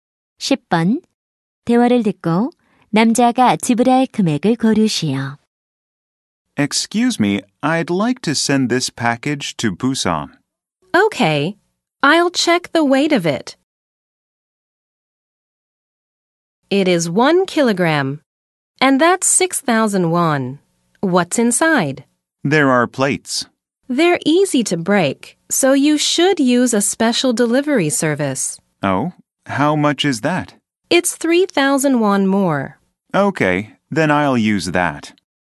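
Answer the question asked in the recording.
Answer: 9,000원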